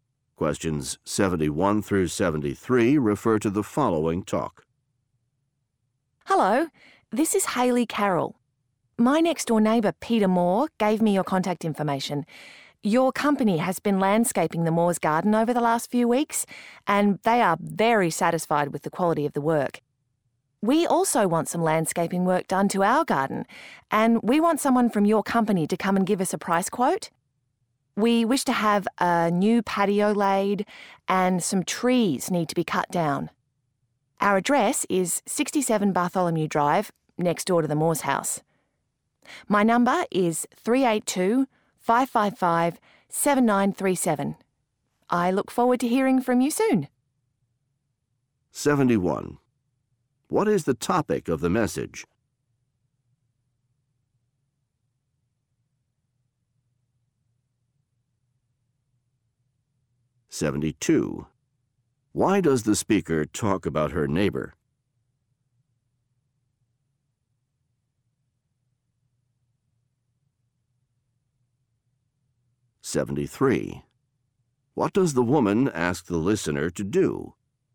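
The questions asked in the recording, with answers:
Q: What is the topic of the message?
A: Requesting a price quote for landscaping work

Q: Why does the speaker talk about her neighbor?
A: The neighbor recommended the company and was satisfied with its work

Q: What does the woman ask the listener to do?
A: Send someone to give a price quote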